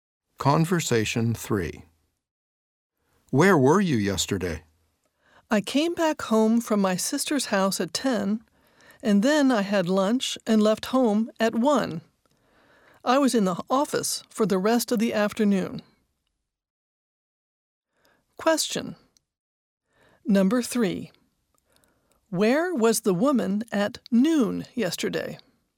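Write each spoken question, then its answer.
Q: Where was the woman at noon yesterday?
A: At home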